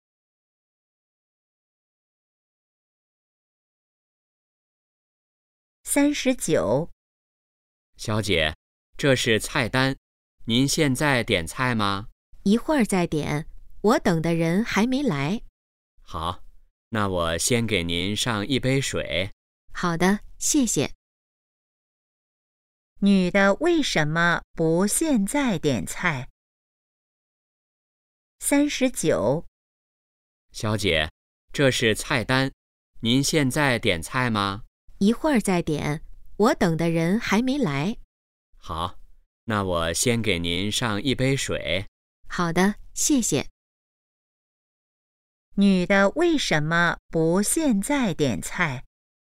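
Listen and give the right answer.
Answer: 她等的人还没来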